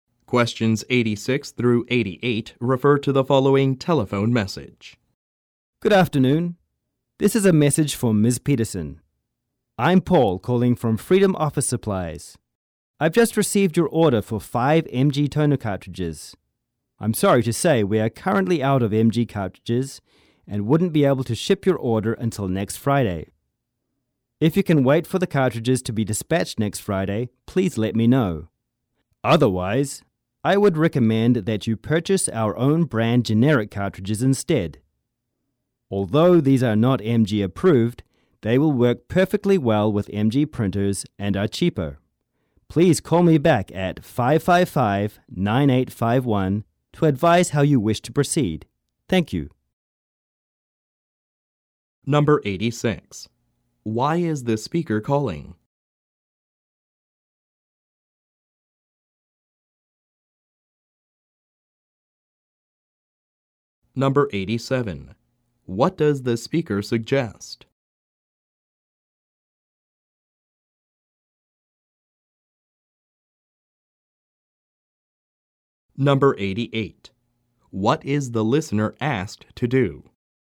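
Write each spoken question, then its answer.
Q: Why is this speaker calling?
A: To say the MG toner cartridges she ordered are out of stock and can't be shipped until next Friday

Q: What does the speaker suggest?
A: Buying the store's own-brand generic cartridges instead

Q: What is the listener asked to do?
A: Call him back at 555-9851 to say how she wants to proceed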